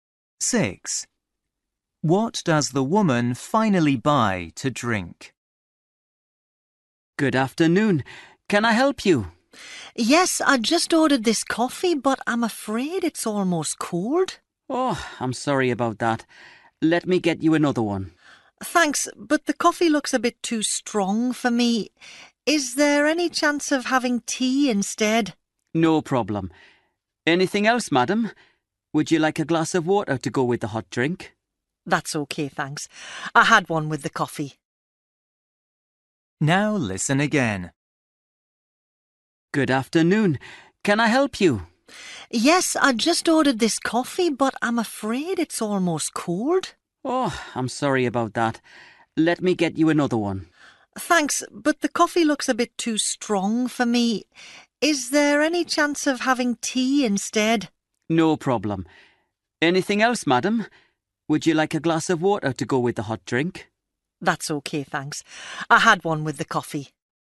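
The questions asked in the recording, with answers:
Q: What does the woman finally buy to drink?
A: Tea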